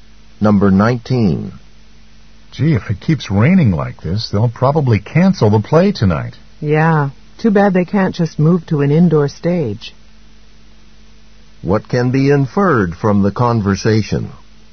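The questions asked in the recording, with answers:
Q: What can be inferred from the conversation?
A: The play is held outdoors.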